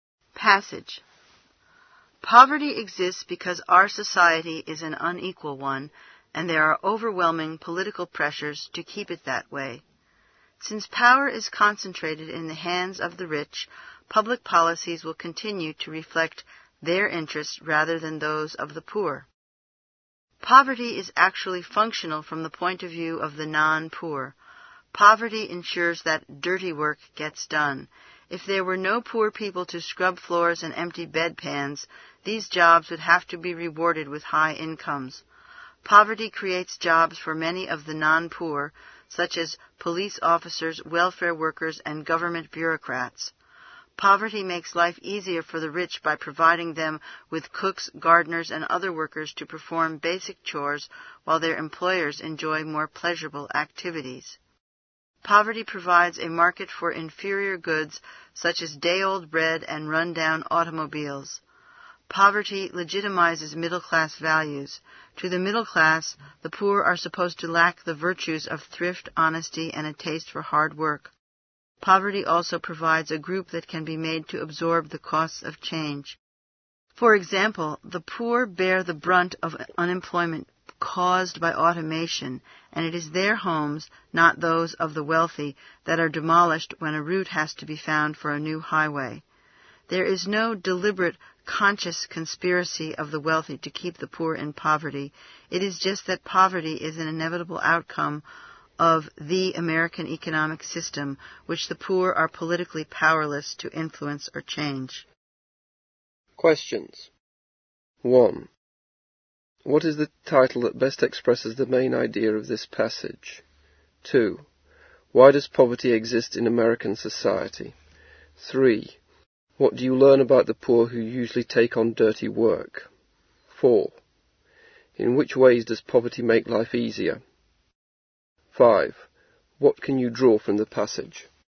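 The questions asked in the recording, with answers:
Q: Why does poverty exist in American society?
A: Because society is unequal and power is concentrated in the hands of the rich

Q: In which ways does poverty make life easier?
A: It gives the rich cooks, gardeners and other workers for basic chores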